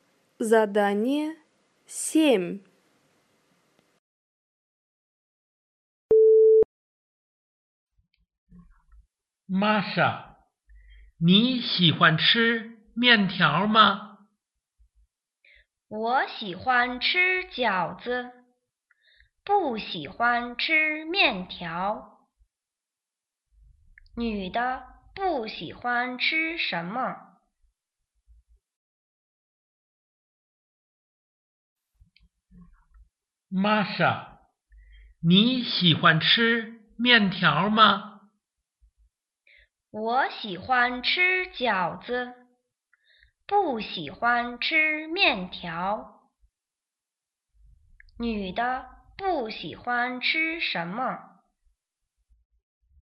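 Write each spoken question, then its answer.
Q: 女的不喜欢吃什么?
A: 面条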